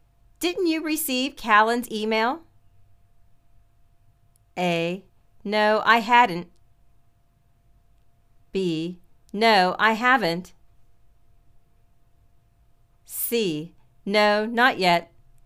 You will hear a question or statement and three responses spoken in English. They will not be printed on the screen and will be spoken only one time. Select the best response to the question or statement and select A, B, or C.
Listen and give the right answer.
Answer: No, not yet.